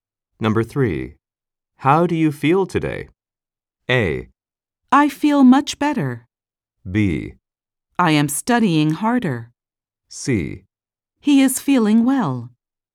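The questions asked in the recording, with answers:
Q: How do you feel today?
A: A: I feel much better.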